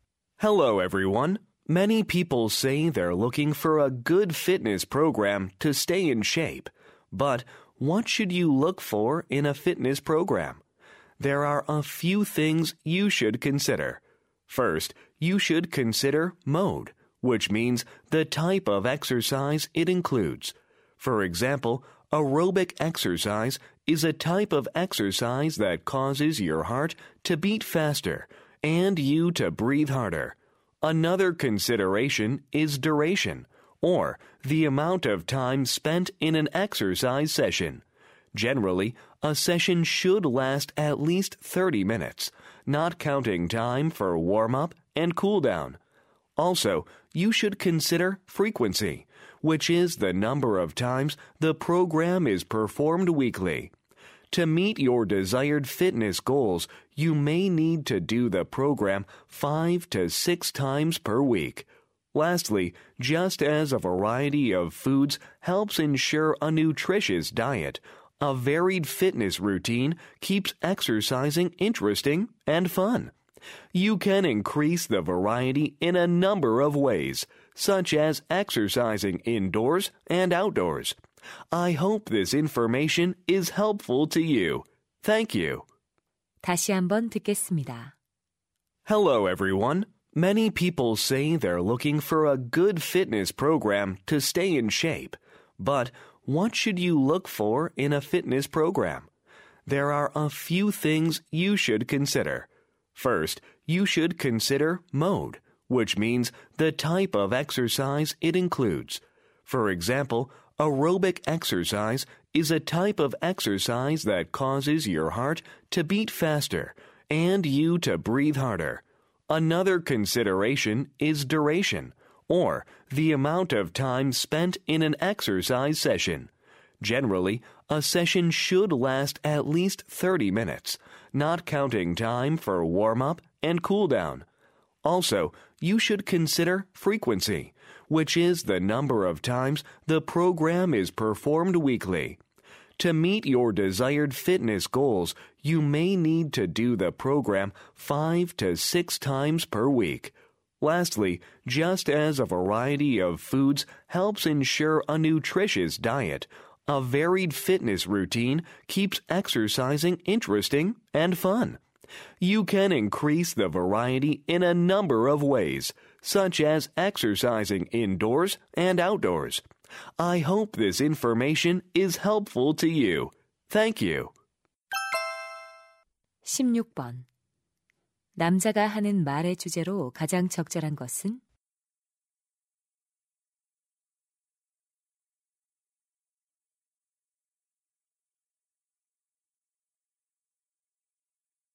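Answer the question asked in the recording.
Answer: 운동 프로그램을 고를 때 고려해야 할 사항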